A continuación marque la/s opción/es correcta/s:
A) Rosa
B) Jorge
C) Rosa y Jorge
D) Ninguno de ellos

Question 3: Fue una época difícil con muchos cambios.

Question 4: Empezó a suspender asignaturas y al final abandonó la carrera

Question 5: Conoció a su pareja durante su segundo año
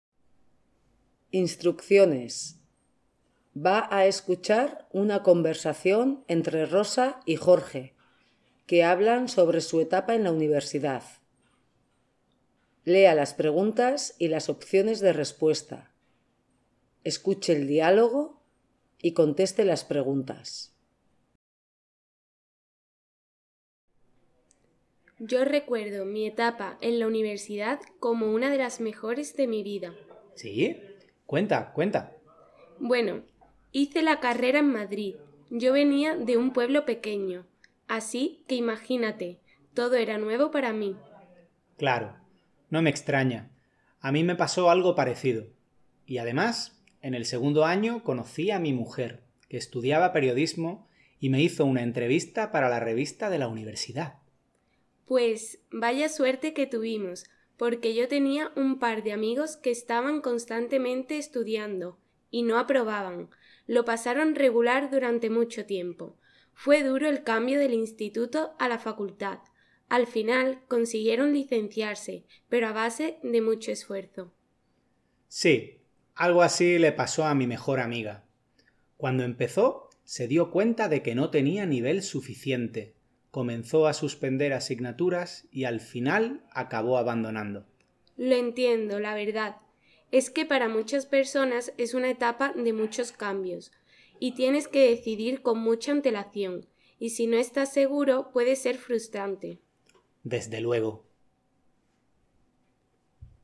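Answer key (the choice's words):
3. Ninguno de ellos
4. Ninguno de ellos
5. Jorge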